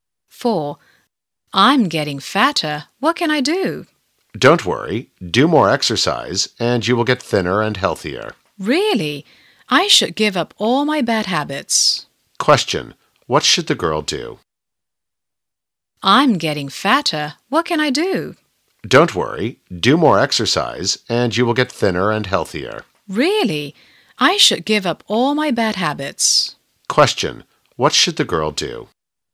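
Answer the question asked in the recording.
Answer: Do more exercise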